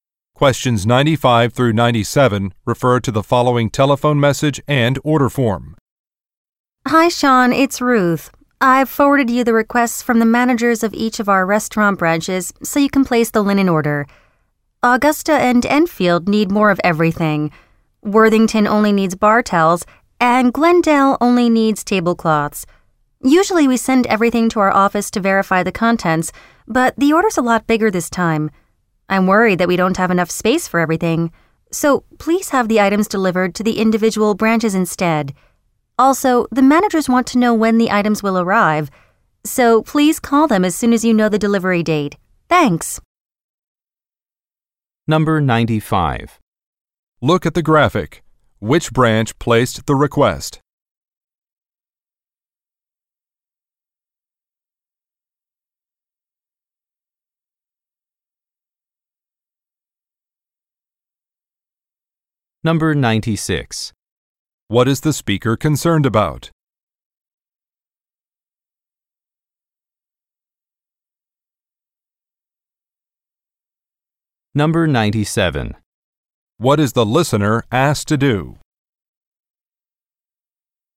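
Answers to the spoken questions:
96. There isn't enough space in the office for the order
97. Call the managers when he knows the delivery date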